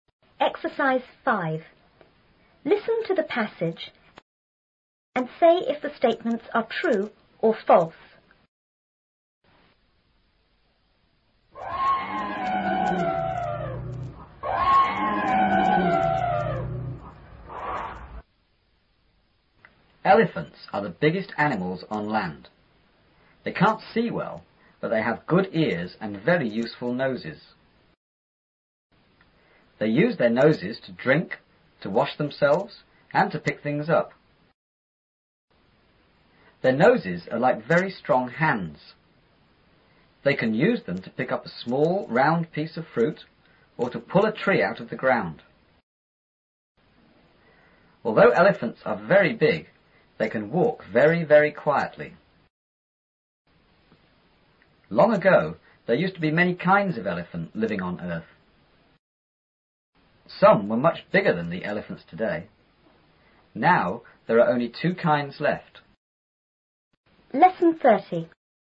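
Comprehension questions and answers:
and say if the statements are true(T) or false(F).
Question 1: Elephants have very good eyes.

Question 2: Elephants drink with their noses.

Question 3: Elephants can pull trees out of the ground.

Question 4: Elephants make a lot of noise when they walk.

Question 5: There are many kinds of elephant on Earth now.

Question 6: Long ago,even bigger elephants used to live on Earth.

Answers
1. F
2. T
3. T
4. F
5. F
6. T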